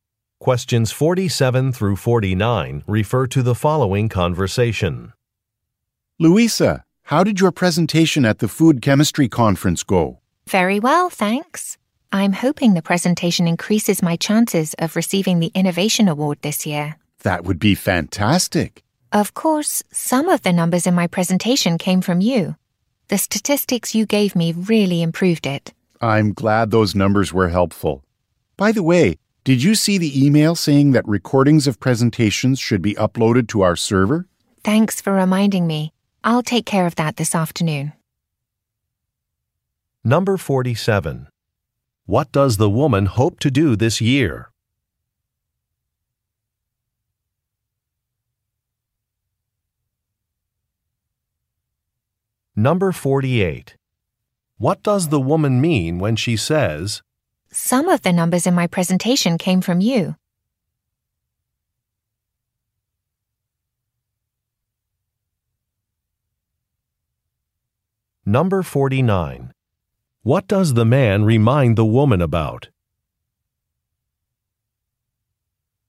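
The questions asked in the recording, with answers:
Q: What does the woman hope to do this year?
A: Receive the Innovation Award

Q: What does the woman mean when she says,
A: She is thanking the man for his help

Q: What does the man remind the woman about?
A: Uploading presentation recordings to the server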